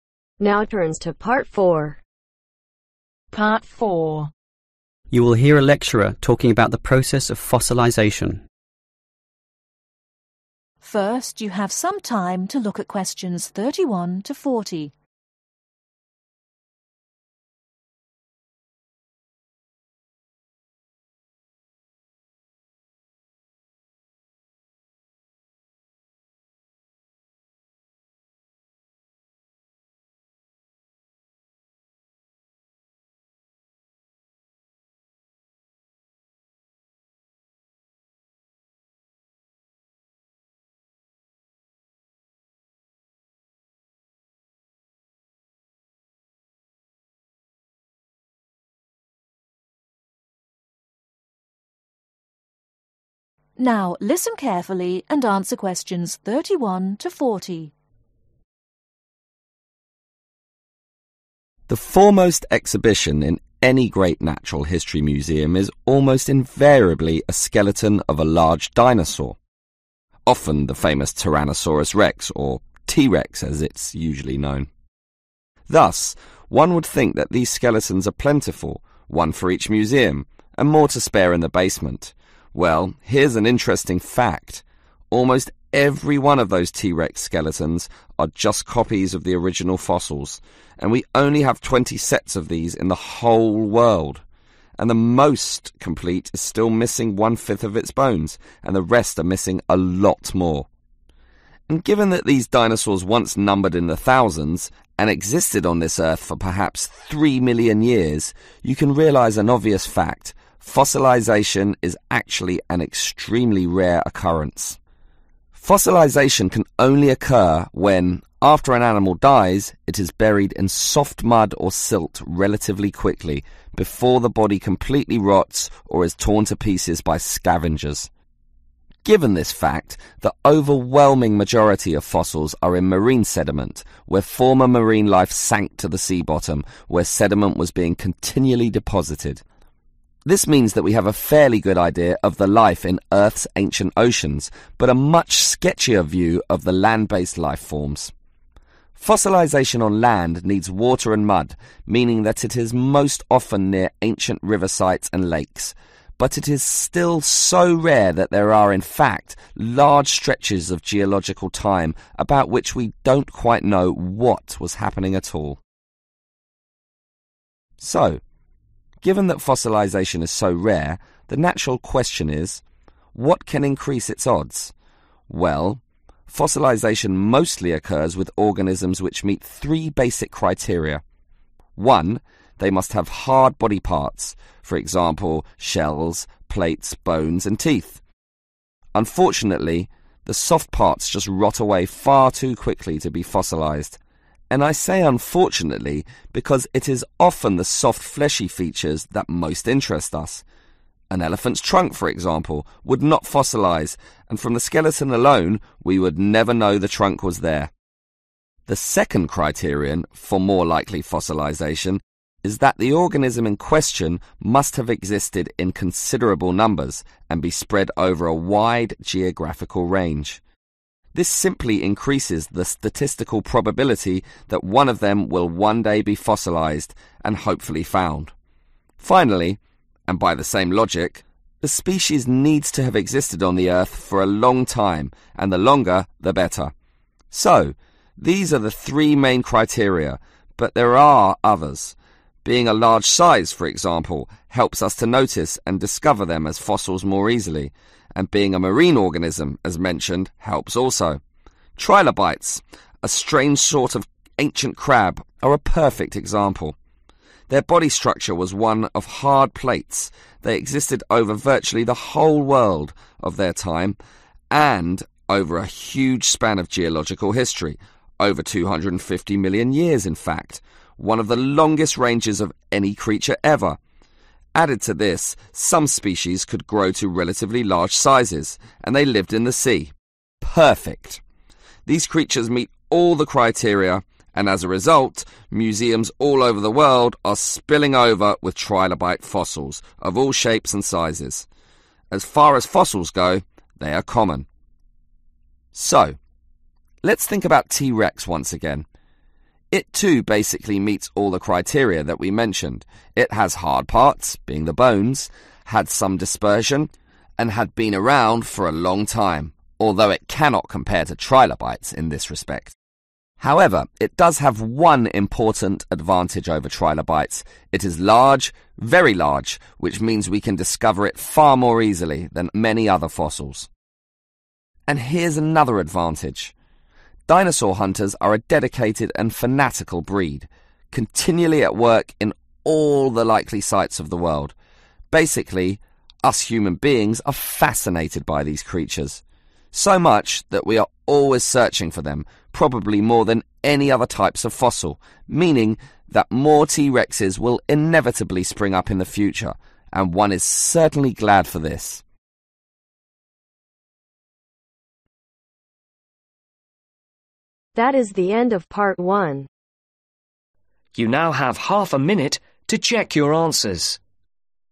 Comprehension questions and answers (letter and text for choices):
Choose the correct letter A , B , or C.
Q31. T-Rex fossils are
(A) quite plentiful.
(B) mostly complete.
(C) liked by museums.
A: (C) liked by museums.

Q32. Fossils are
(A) usually torn to pieces.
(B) mostly from former sea bottoms.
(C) easily found.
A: (B) mostly from former sea bottoms.

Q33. Land-based fossils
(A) number more than sea-based ones.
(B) were formed near water courses.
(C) have given much information.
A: (B) were formed near water courses.